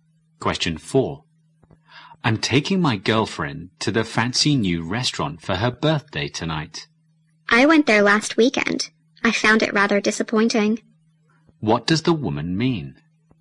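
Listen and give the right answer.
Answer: The restaurant isn't as good as expected.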